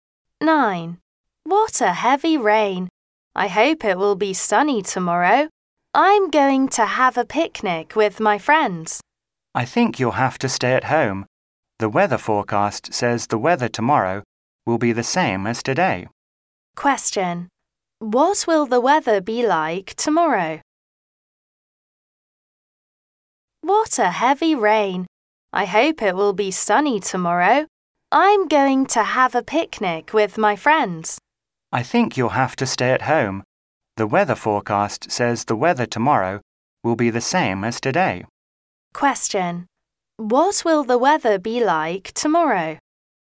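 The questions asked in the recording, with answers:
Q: What will the weather be like tomorrow?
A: Rainy (heavy rain, same as today)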